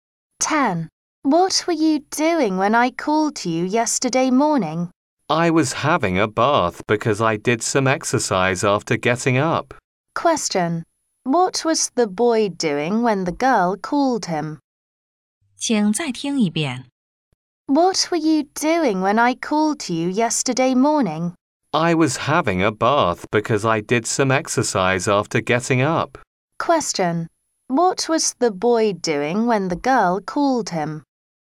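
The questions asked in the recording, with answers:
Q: What was the boy doing when the girl called him?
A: Having a bath.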